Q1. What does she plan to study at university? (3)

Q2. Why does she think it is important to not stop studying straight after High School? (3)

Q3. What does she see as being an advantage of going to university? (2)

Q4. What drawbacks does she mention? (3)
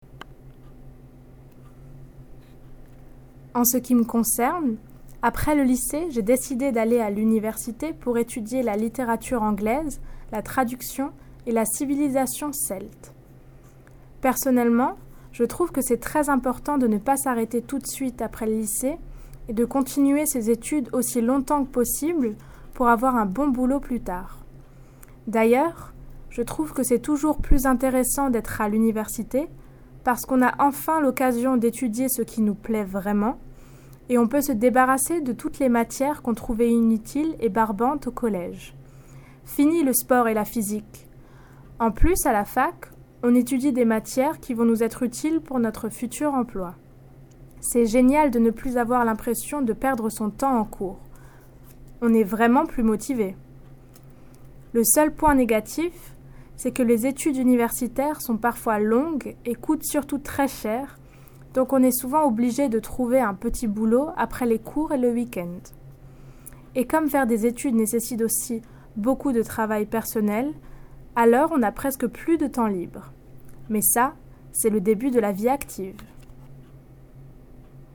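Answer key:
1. English literature, translation and Celtic civilisation
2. To continue studying as long as possible to get a good job later
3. You study what you really like and drop useless, boring subjects
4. Studies are long and expensive, you need a part-time job, and you have almost no free time

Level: New Higher French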